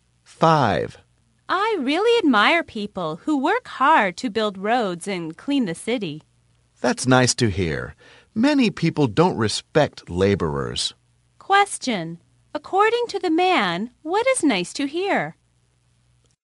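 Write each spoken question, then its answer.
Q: According to the man, what is nice to hear?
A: That the woman admires laborers who build roads and clean the city.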